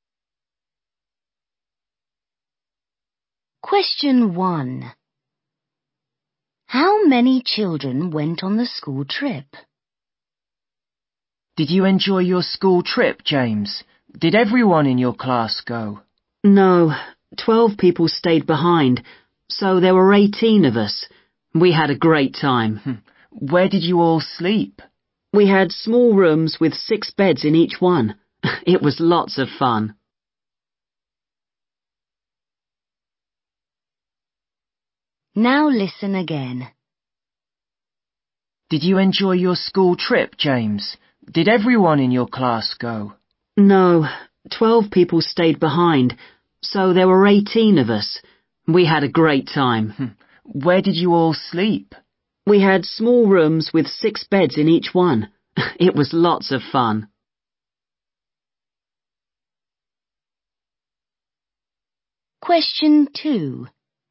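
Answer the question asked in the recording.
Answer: 18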